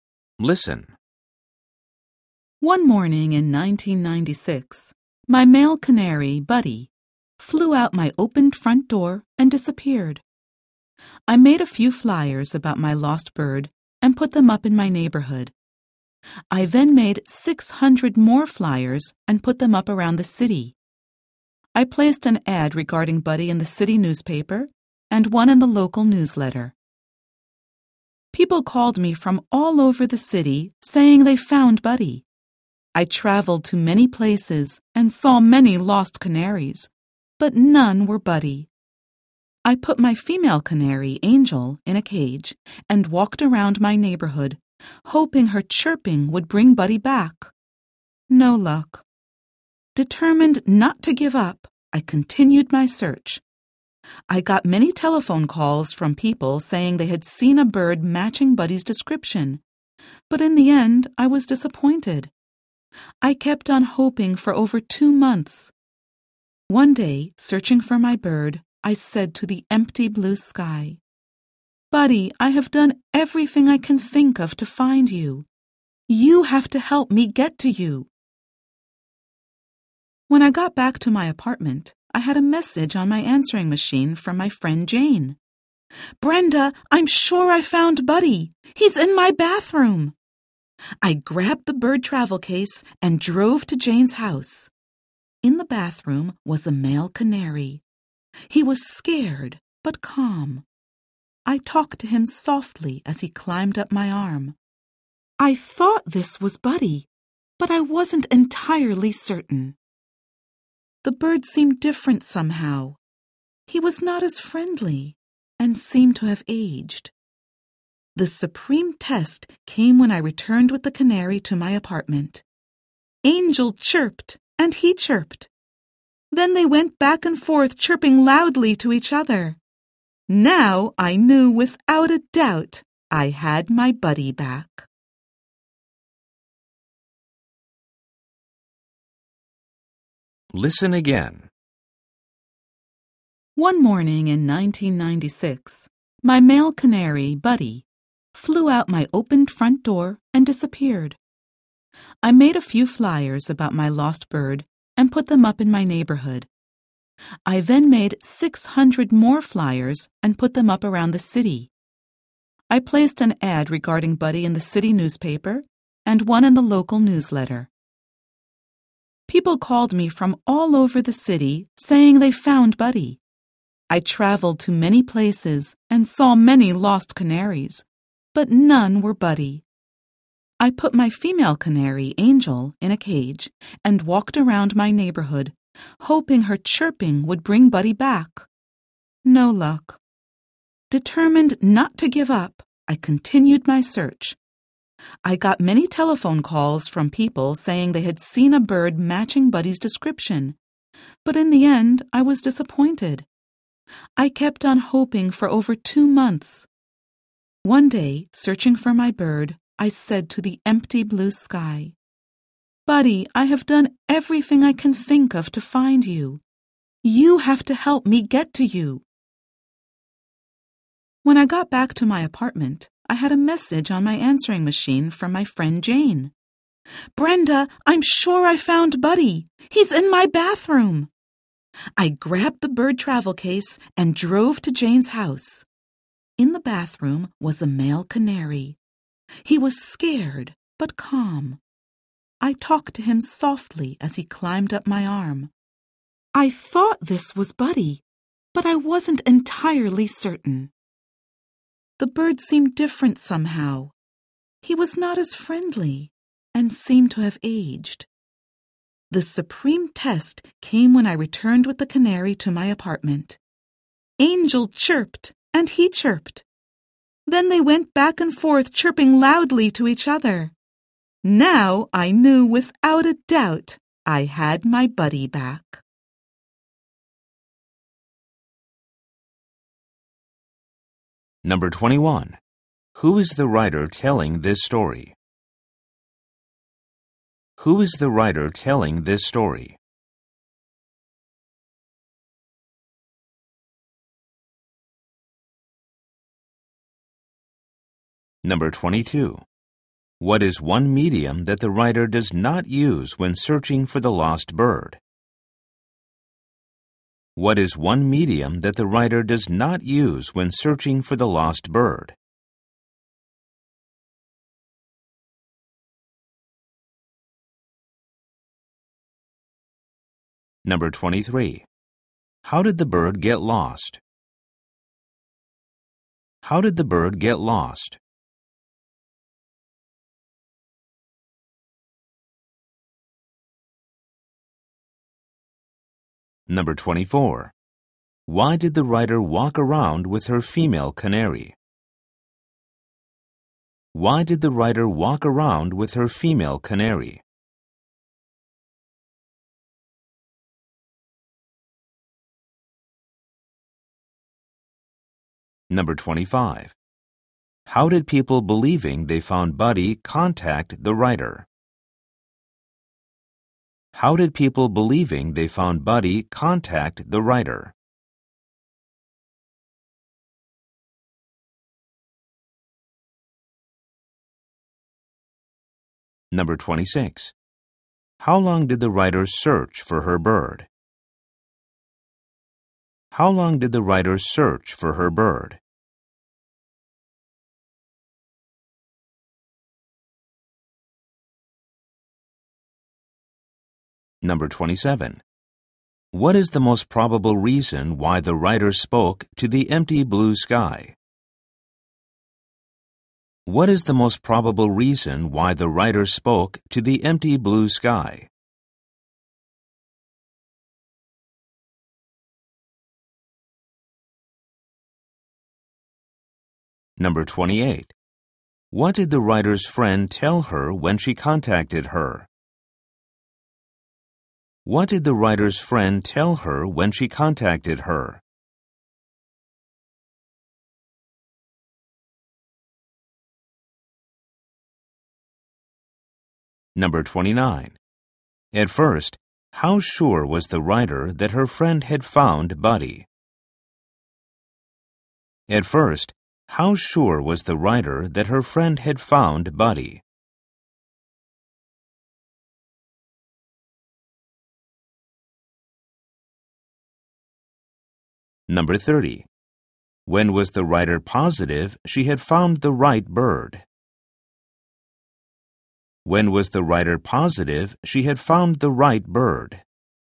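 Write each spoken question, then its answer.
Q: Who is the writer telling this story?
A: Brenda, the owner of the canary Buddy

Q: How did the bird get lost?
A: It flew out the open front door

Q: Why did the writer walk around with her female canary?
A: She hoped Angel's chirping would bring Buddy back

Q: How did people believing they found Buddy contact the writer?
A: By telephone

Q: How long did the writer search for her bird?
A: Over two months

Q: What did the writer's friend tell her when she contacted her?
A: That she was sure she had found Buddy and he was in her bathroom

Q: At first, how sure was the writer that her friend had found Buddy?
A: Not entirely certain

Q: When was the writer positive she had found the right bird?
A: When the bird and Angel chirped loudly back and forth to each other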